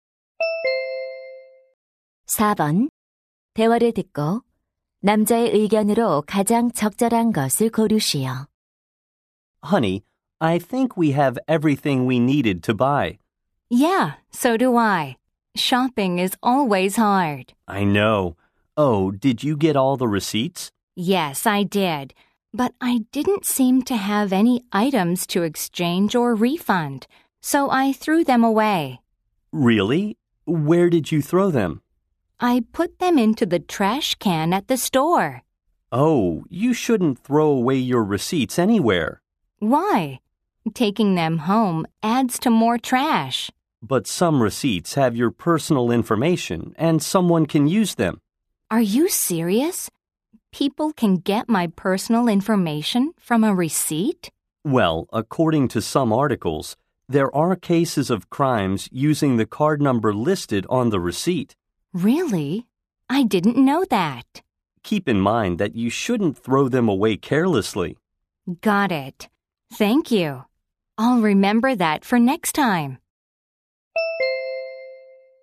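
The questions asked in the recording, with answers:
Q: 대화를 듣고 남자의 의견으로 가장 적절한 것을 고르시오.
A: 개인정보가 담긴 영수증을 함부로 버리면 안 된다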